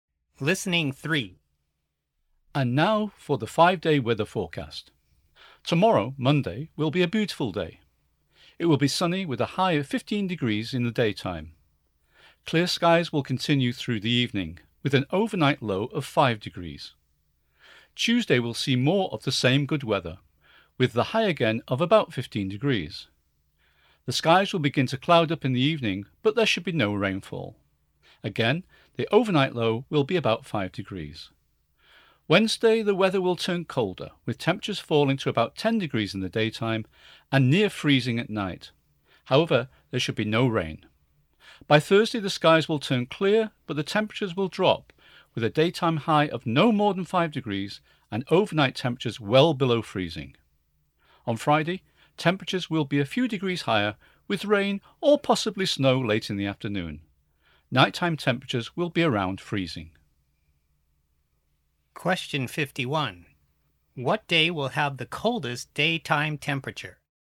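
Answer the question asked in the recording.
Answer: Thursday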